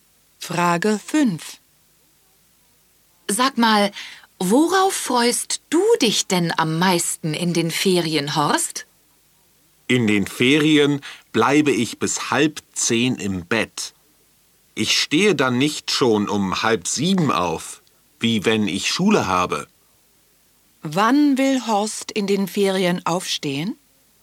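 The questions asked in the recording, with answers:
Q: Wann will Horst in den Ferien aufstehen?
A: Um 9:30 Uhr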